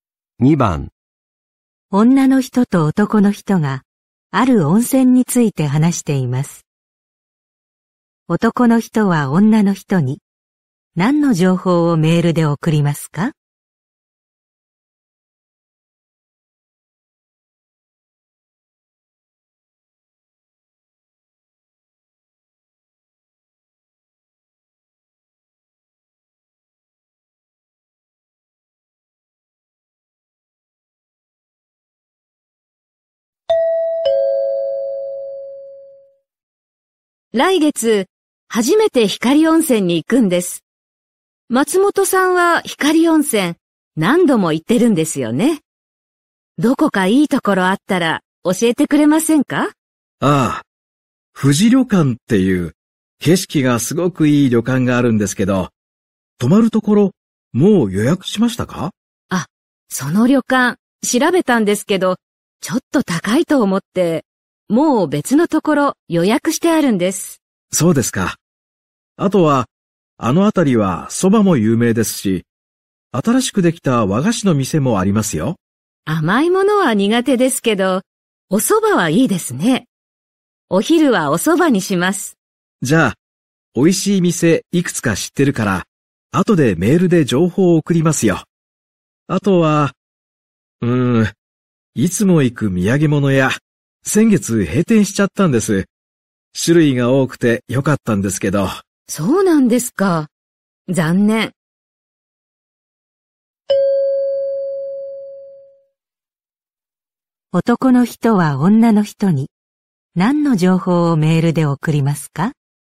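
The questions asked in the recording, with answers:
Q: 男の人は女の人に何の情報をメールで送りますか?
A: 美味しい蕎麦の店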